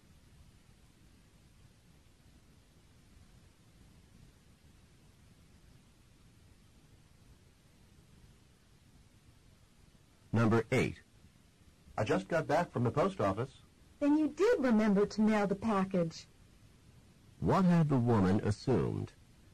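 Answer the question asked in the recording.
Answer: That the man had forgotten to mail the package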